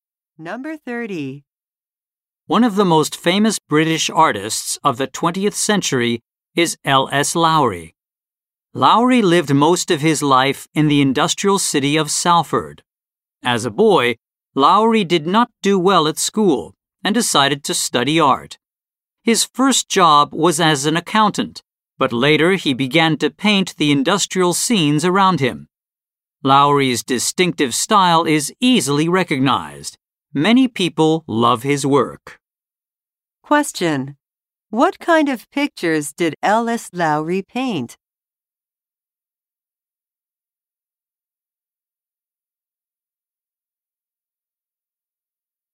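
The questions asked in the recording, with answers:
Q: What kind of pictures did L.S. Lowry paint?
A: Industrial scenes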